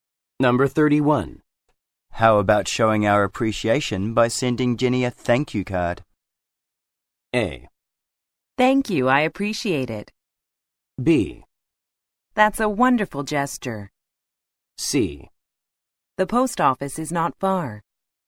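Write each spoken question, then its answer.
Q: How about showing our appreciation by sending Jenny a thank you card?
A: B: That's a wonderful gesture.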